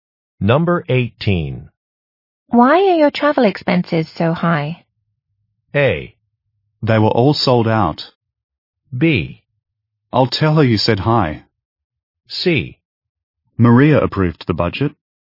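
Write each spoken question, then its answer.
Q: Why are your travel expenses so high?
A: C: Maria approved the budget.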